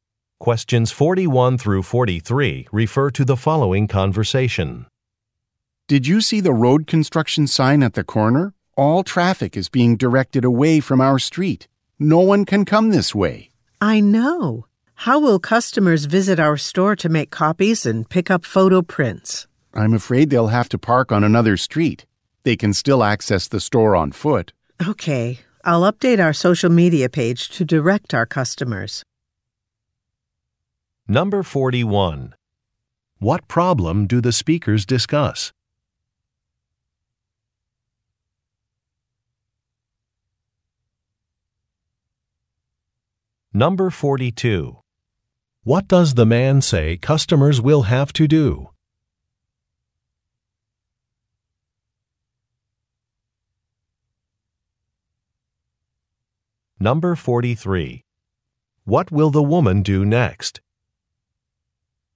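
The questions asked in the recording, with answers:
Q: What problem do the speakers discuss?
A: Road construction is directing traffic away from their street

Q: What does the man say customers will have to do?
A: Park on another street

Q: What will the woman do next?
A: Update their social media page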